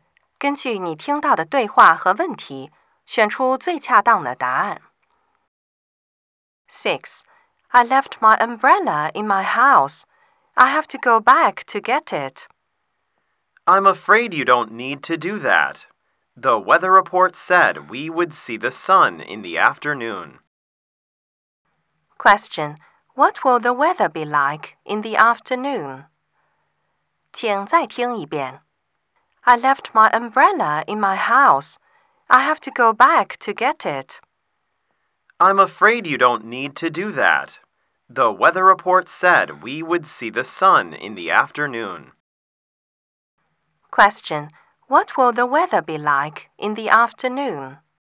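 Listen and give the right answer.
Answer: Sunny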